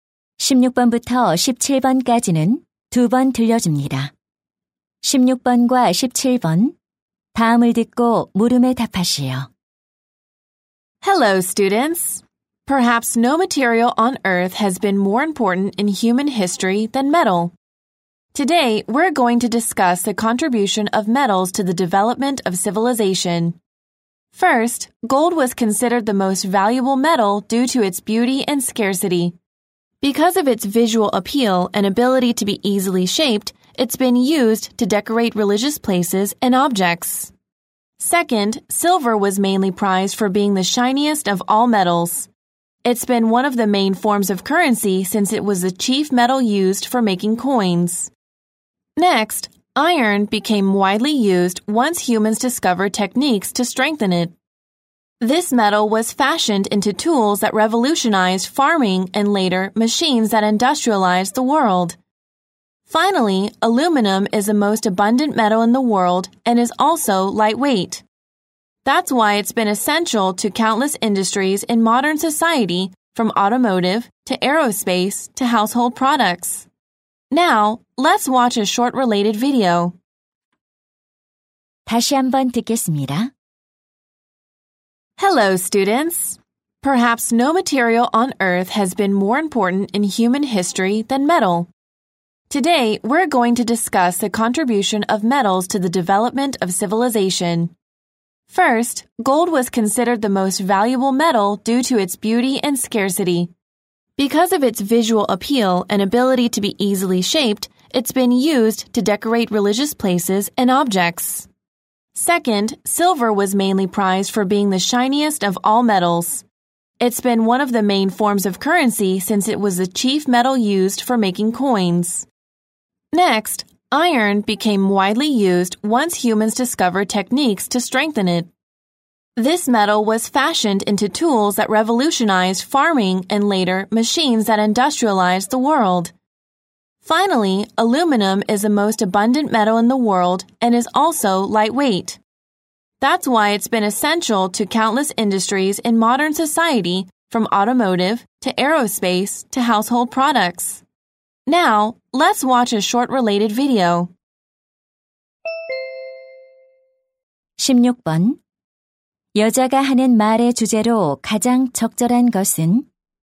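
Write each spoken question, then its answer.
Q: 여자가 하는 말의 주제로 가장 적절한 것은?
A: 문명 발달에 대한 금속의 기여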